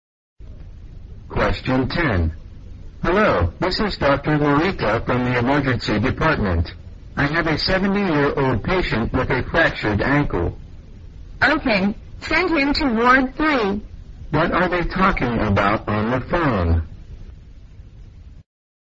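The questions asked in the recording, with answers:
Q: What are they talking about on the phone?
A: Sending a patient with a fractured ankle to a ward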